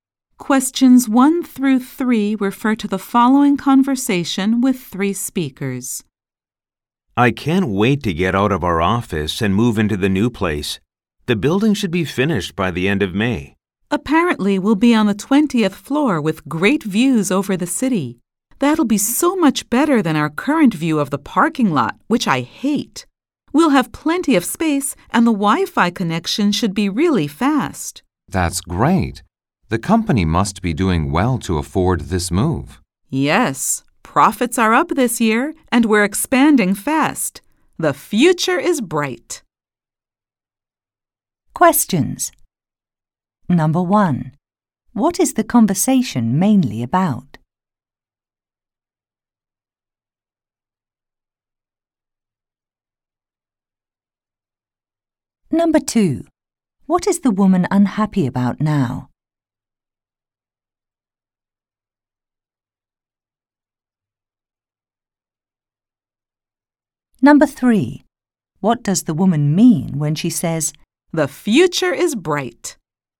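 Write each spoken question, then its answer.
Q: What is the conversation mainly about?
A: Moving into a new office building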